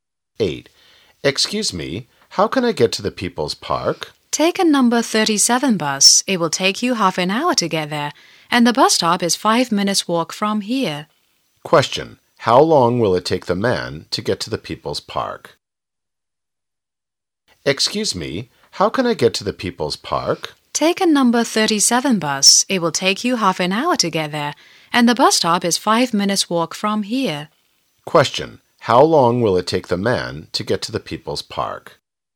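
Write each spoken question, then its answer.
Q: How long will it take the man to get to the People's Park?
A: 35 minutes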